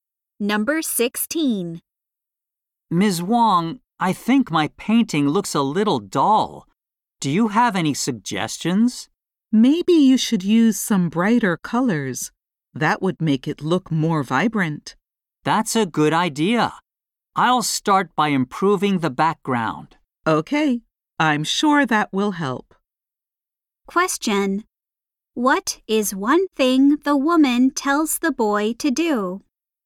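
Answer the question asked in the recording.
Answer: Use brighter colors.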